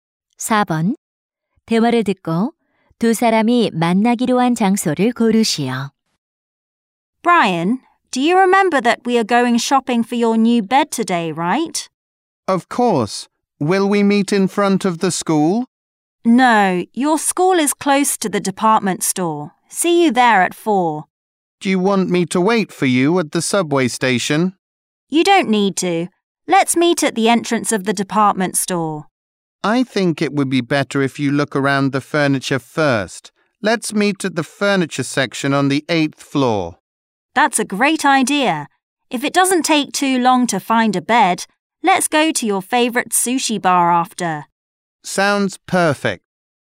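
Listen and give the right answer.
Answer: 백화점 8층 가구 매장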